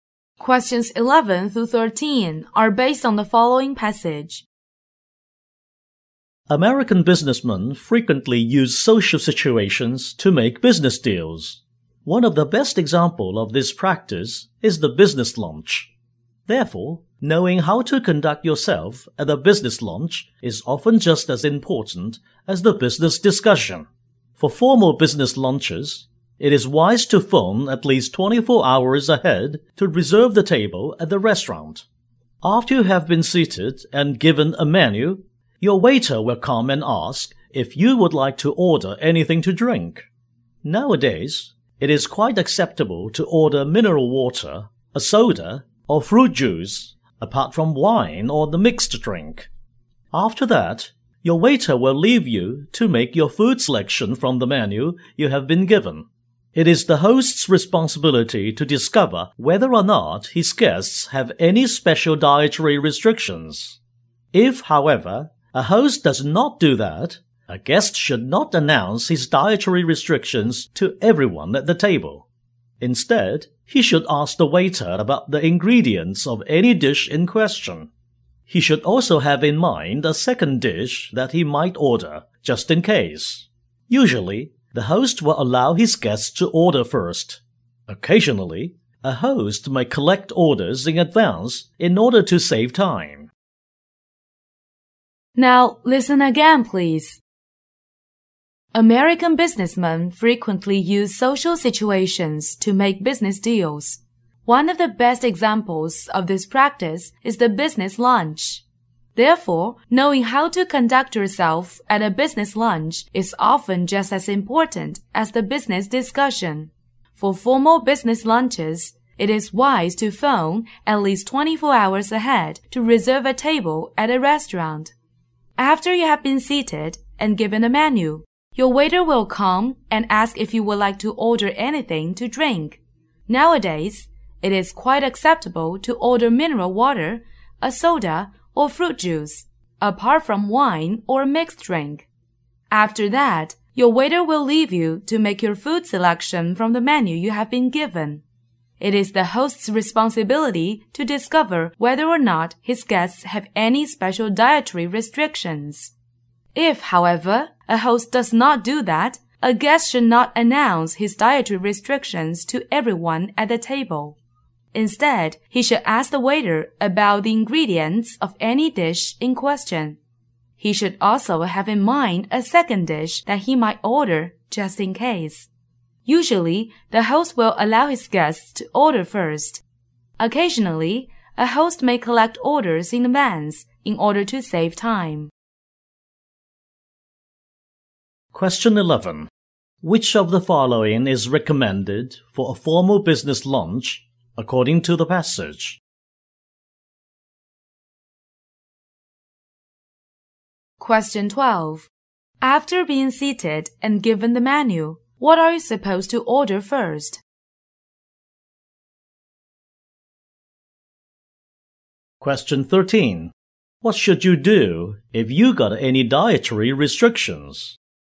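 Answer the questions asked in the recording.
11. Phoning at least 24 hours ahead to reserve a table
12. Something to drink
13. Ask the waiter about the ingredients of the dish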